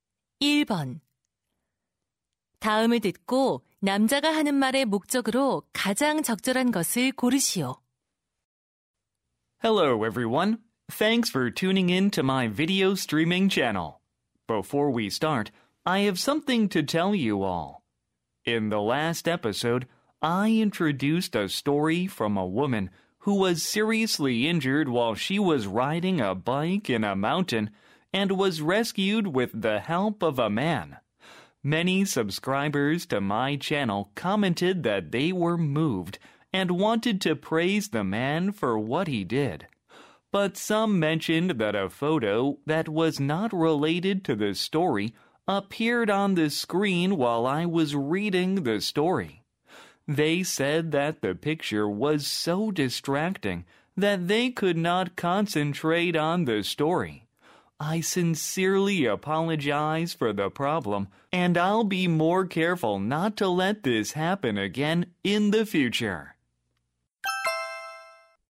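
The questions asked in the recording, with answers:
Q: 다음을 듣고 남자가 하는 말의 목적으로 가장 적절한 것을 고르시오.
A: 지난 방송에서 이야기와 무관한 사진이 나온 것을 사과하려고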